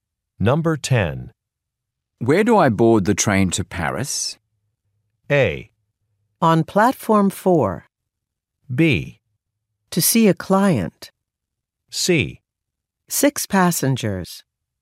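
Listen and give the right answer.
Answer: A: On platform 4.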